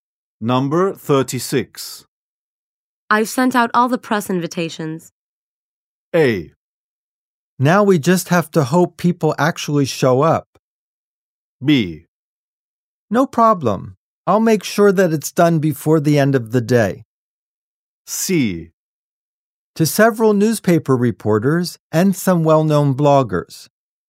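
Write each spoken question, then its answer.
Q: I've sent out all the press invitations.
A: A: Now we just have to hope people actually show up.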